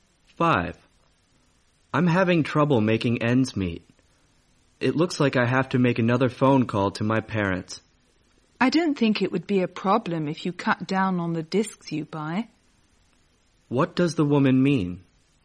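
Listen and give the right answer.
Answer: He should spend less on discs instead of asking his parents for money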